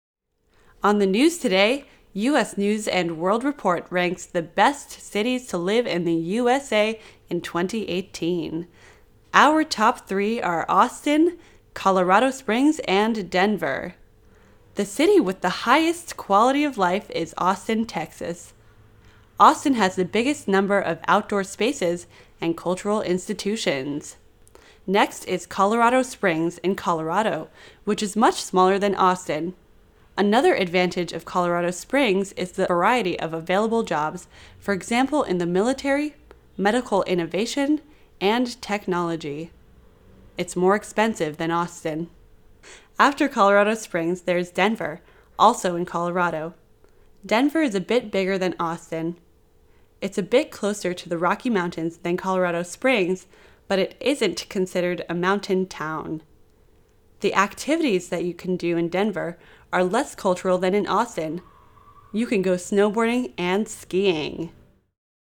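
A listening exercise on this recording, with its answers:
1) Which city in the U.S is the second best place to live? Listen and choose the correct sentence.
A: Colorado Springs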